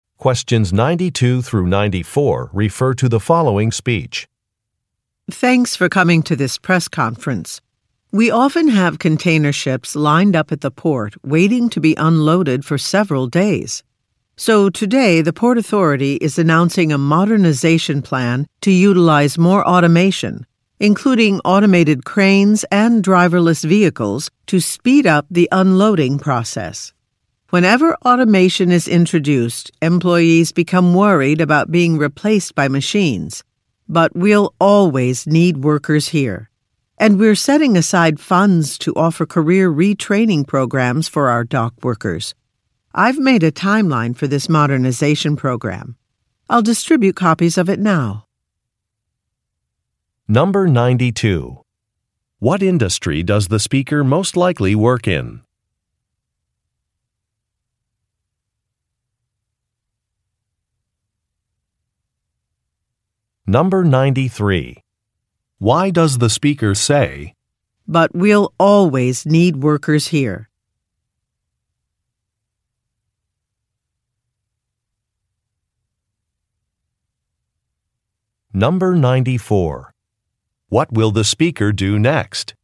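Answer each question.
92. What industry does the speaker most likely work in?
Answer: Shipping

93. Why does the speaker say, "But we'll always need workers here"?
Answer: To address a concern

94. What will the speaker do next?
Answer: Distribute a document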